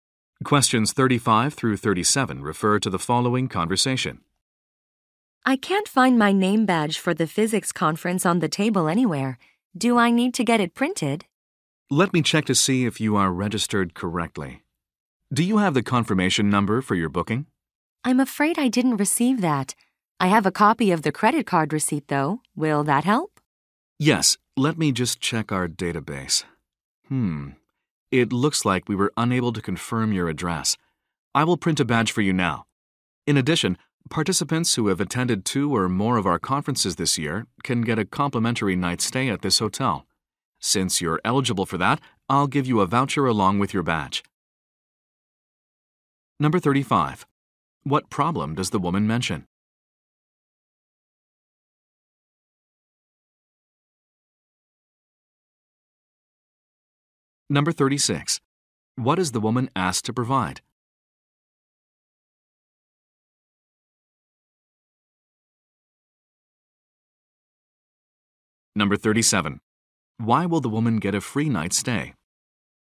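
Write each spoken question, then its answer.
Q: What problem does the woman mention?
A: She can't find her name badge

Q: What is the woman asked to provide?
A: Her booking confirmation number

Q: Why will the woman get a free night stay?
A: She has attended two or more of their conferences this year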